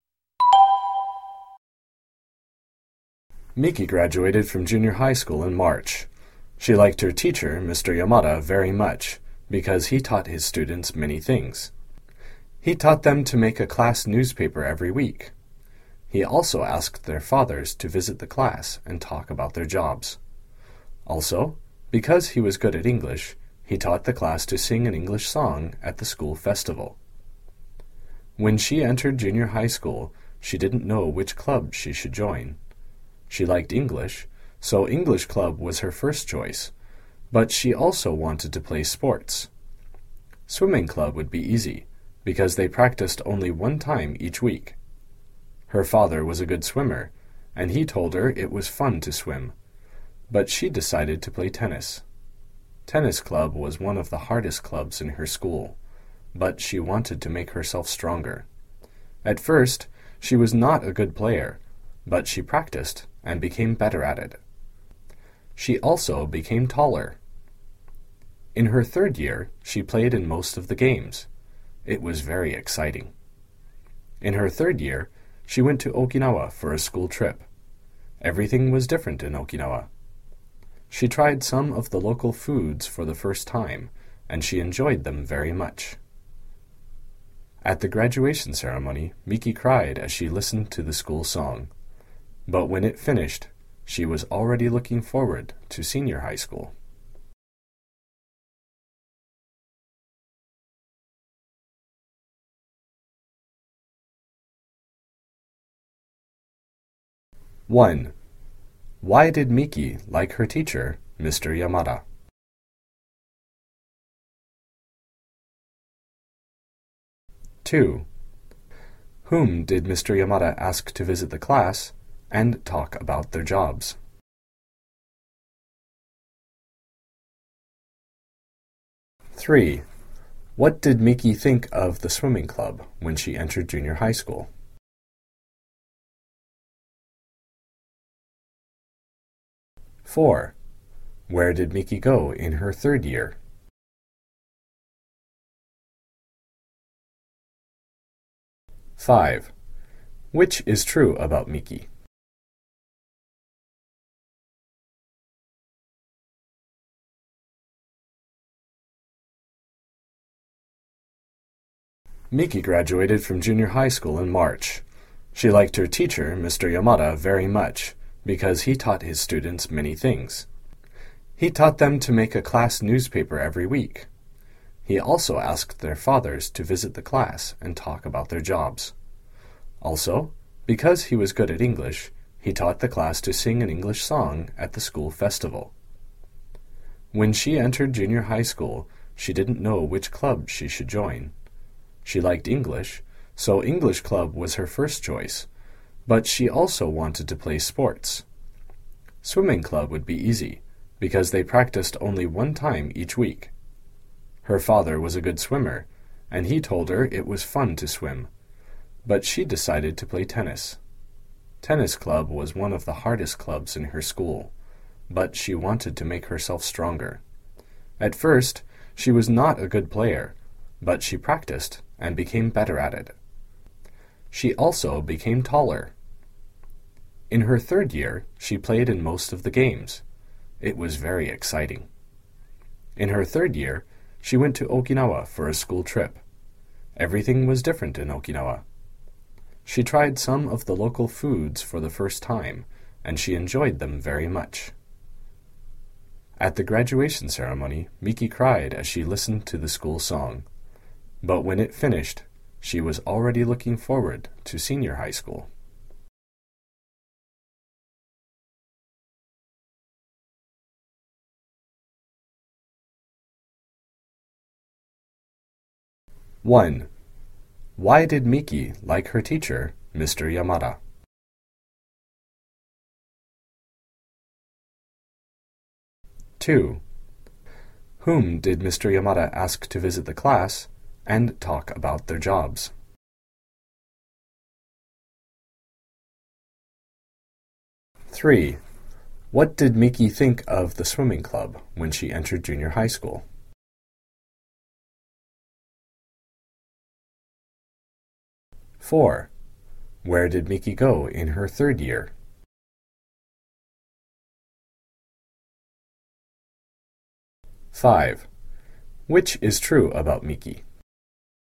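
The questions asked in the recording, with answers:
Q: Why did Miki like her teacher, Mr. Yamada?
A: Because he taught his students many things.

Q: Whom did Mr. Yamada ask to visit the class and talk about their jobs?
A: The students' fathers.

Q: What did Miki think of the swimming club when she entered junior high school?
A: She thought it would be easy, because they practiced only once a week.

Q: Where did Miki go in her third year?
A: To Okinawa, on a school trip.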